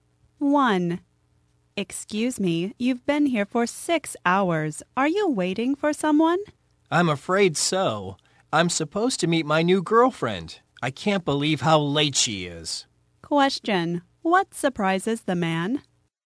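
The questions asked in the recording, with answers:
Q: What surprises the man?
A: How late his new girlfriend is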